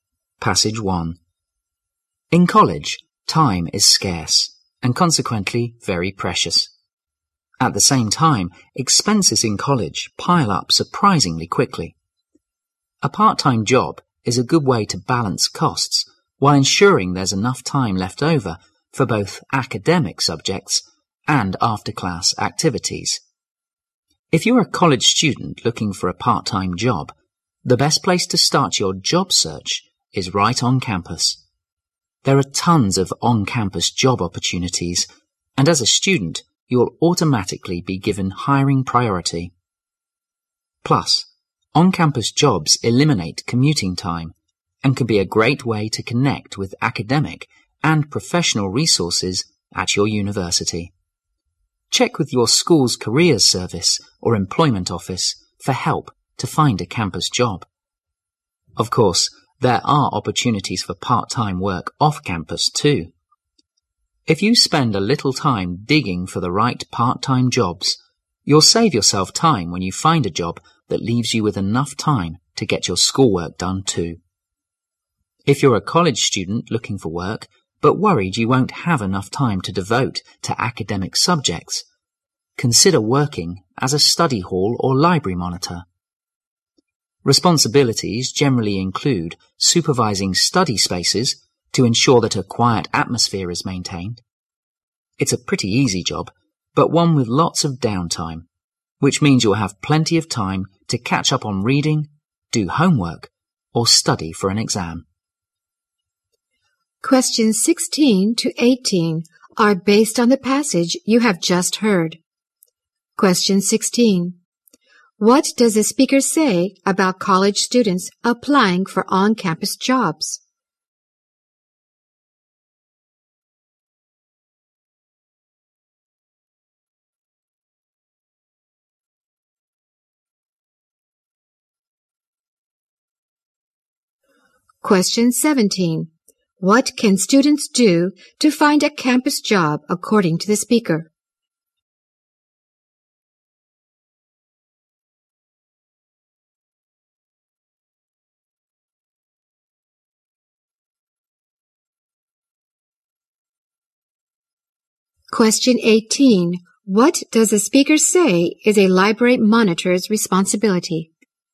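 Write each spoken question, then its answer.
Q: What does the speaker say about college students applying for on-campus jobs?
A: They are given hiring priority

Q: What can students do to find a campus job according to the speaker?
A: Check with the school's careers service or employment office

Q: What does the speaker say is a library monitor's responsibility?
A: Supervising study spaces to keep them quiet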